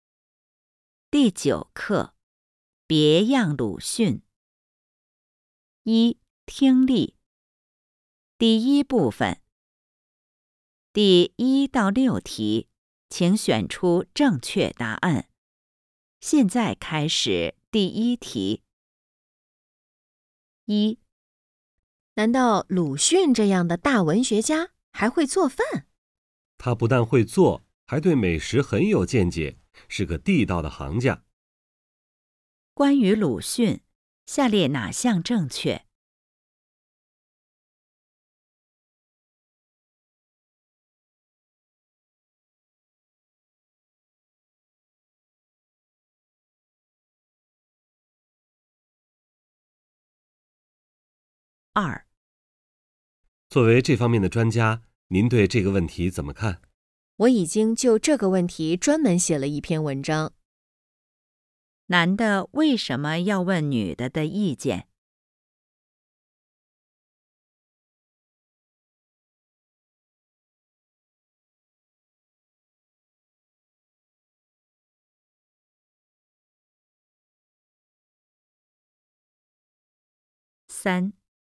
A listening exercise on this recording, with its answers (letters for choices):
第1-6题:请选择正确答案。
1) 关于鲁迅,下列哪项正确?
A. 他只吃不做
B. 他不会做饭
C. 他很会各种粮食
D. 他很了解美食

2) 男的为什么要问女的的意见?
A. 女的是专家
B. 女的是记者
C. 女的很有想法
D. 女的写了一篇文章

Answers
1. D
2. A

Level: HSK 5